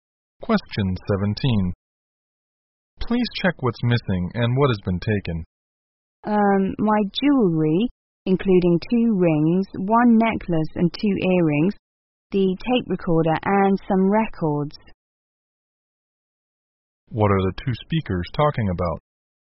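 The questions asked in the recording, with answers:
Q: What are the 2 speakers talking about?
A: Things stolen in a burglary.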